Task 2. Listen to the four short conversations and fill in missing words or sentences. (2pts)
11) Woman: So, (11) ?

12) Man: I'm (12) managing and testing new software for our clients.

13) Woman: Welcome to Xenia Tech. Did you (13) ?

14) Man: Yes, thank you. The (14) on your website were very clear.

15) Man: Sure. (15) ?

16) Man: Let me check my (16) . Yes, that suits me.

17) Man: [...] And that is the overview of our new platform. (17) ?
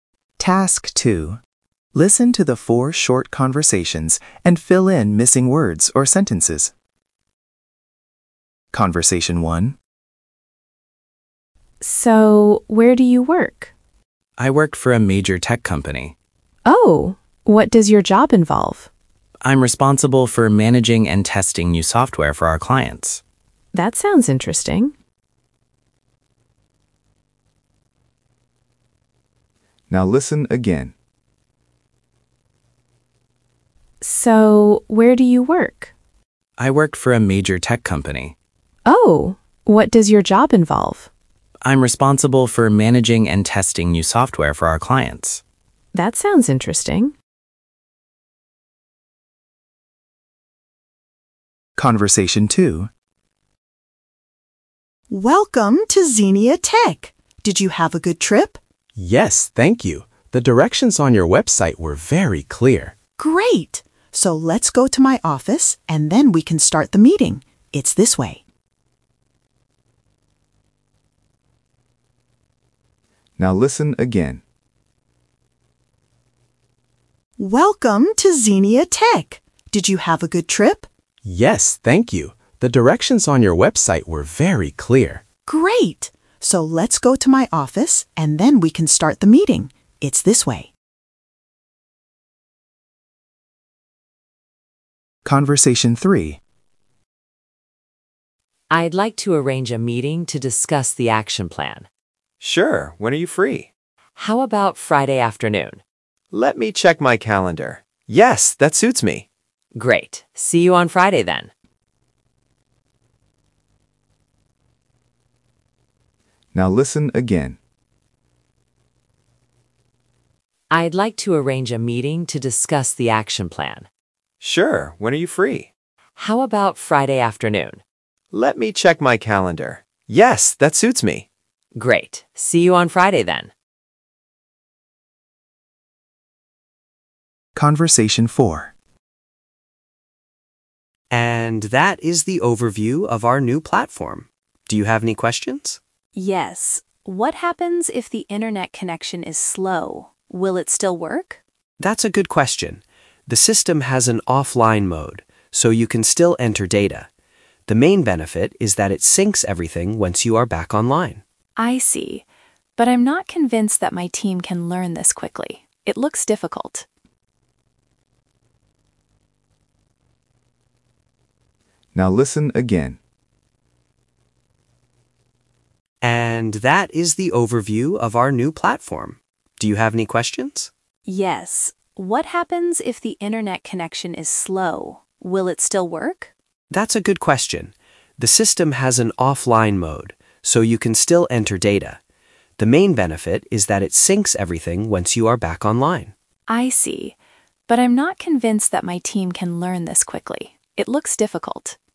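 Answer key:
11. where do you work
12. responsible for
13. have a good trip
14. directions
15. When are you free
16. calendar
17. Do you have any questions

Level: A1+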